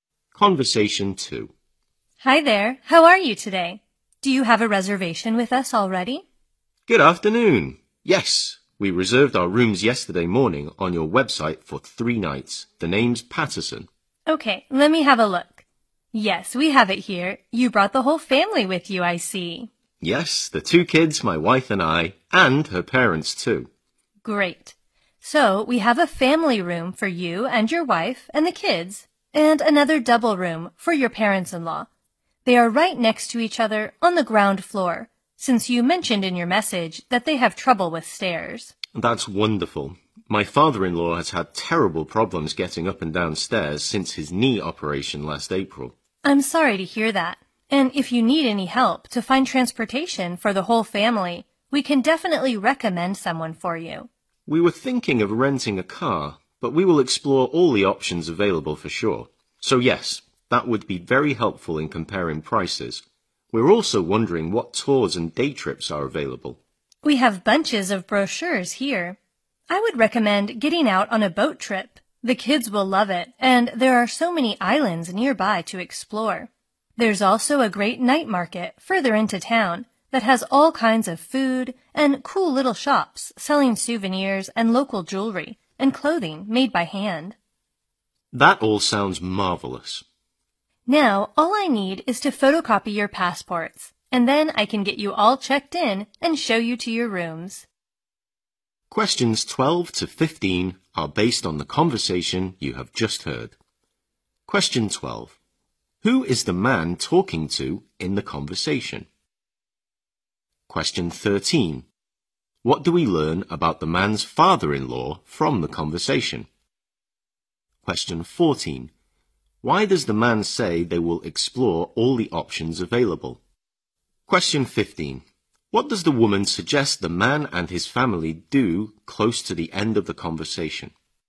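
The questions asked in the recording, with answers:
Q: Who is the man talking to in the conversation?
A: A hotel receptionist

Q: What do we learn about the man's father-in-law from the conversation?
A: He has trouble with stairs since his knee operation

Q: Why does the man say they will explore all the options available?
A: To compare prices for transportation

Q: What does the woman suggest the man and his family do close to the end of the conversation?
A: Go on a boat trip to nearby islands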